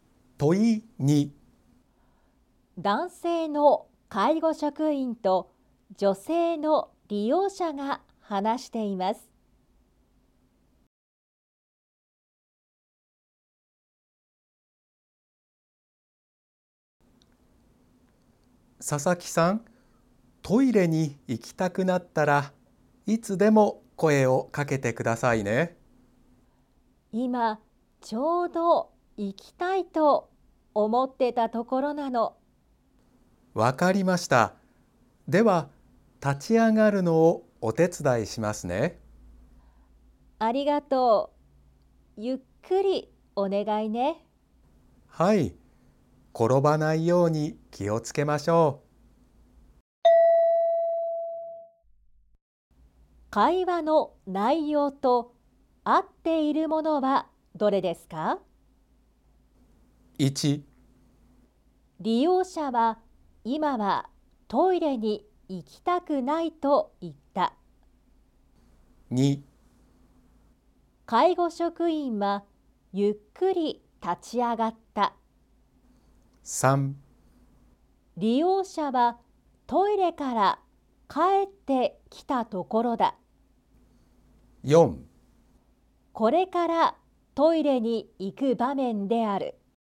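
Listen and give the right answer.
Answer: 4: これからトイレに行く場面である。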